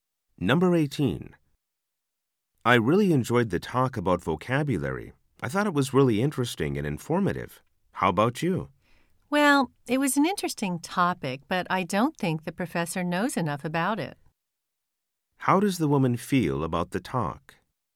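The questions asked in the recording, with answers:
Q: How does the woman feel about the talk?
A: The topic was interesting but the professor didn't know enough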